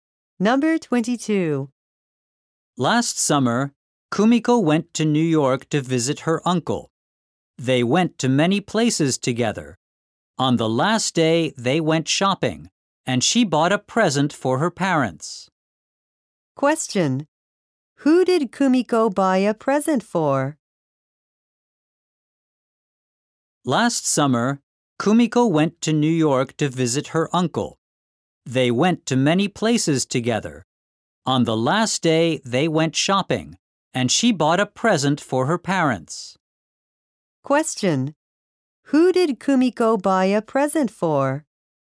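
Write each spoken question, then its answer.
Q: Who did Kumiko buy a present for?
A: Her parents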